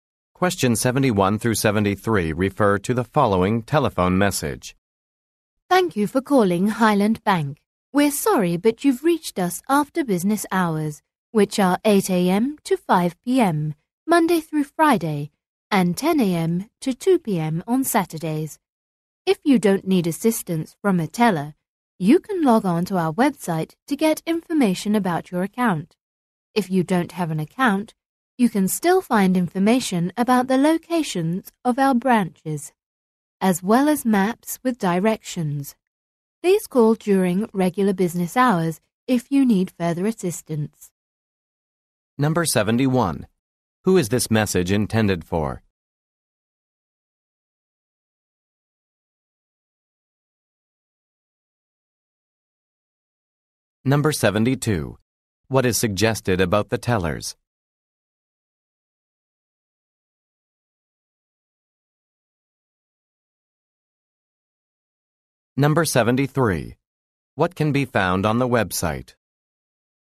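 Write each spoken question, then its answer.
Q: Who is this message intended for?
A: People calling the bank after business hours

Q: What is suggested about the tellers?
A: They are available only during business hours

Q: What can be found on the website?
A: Account information, branch locations and maps with directions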